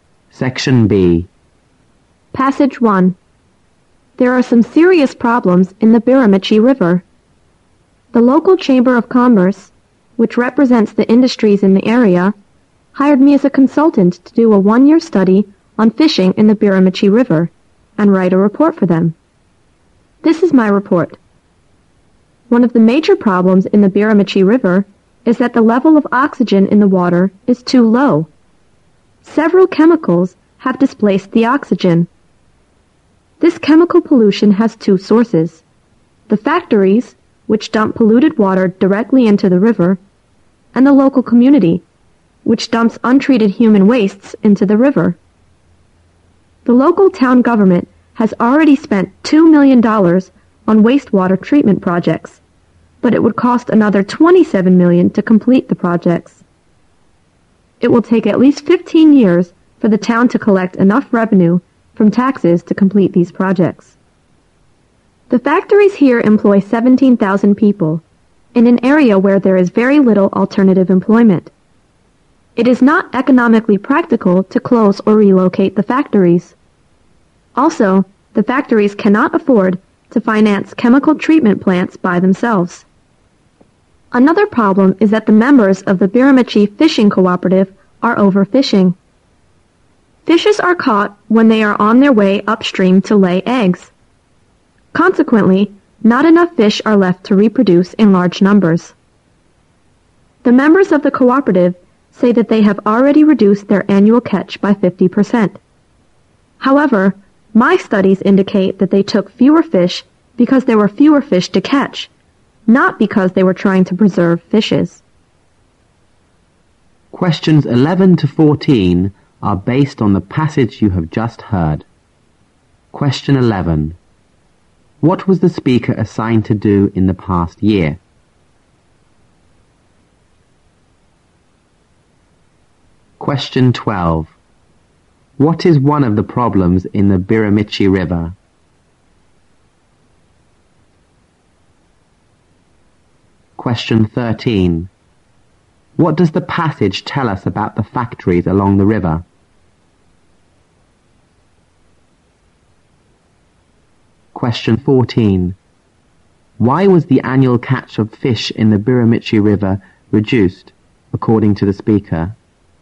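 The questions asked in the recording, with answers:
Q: What was the speaker assigned to do in the past year?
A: A study of fishing in the Biramichi River, with a report on it.

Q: What is one of the problems in the Biramichi River?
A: The oxygen level in the water is too low.

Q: What does the passage tell us about the factories along the river?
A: They can't afford chemical treatment plants, and closing or moving them isn't practical.

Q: Why was the annual catch of fish in the Biramichi River reduced, according to the speaker?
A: There were fewer fish to catch.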